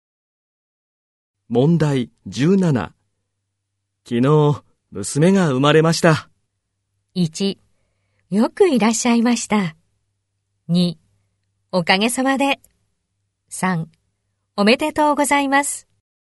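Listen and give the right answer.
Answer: 3: おめでとうございます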